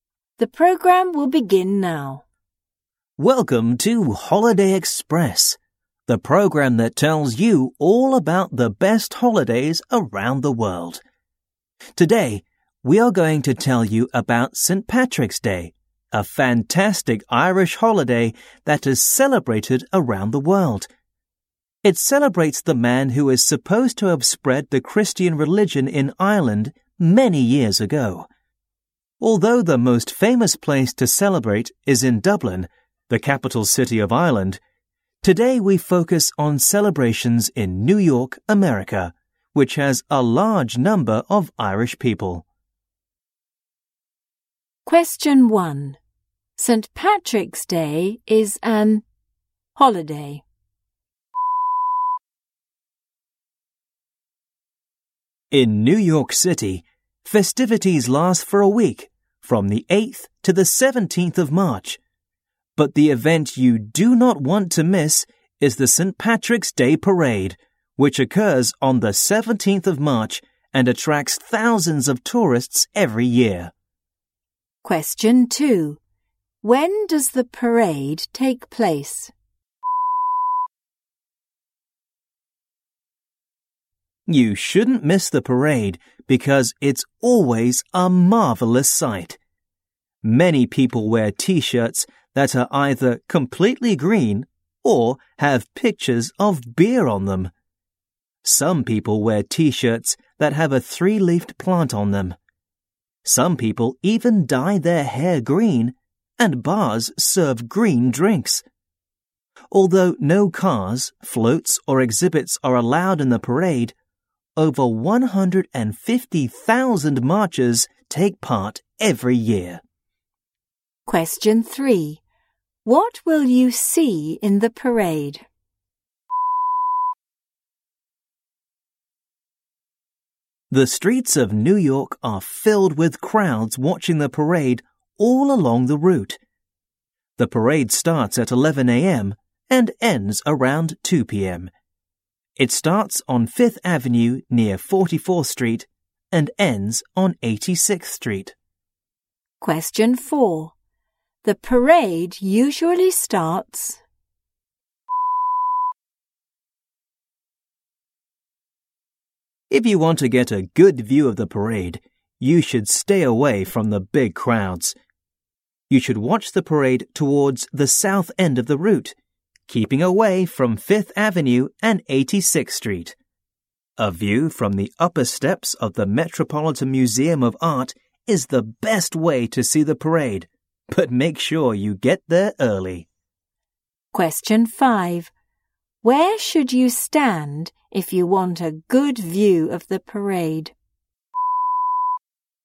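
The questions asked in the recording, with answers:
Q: When does the parade take place?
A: On the 17th of March

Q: Where should you stand if you want a good view of the parade?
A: On the upper steps of the Metropolitan Museum of Art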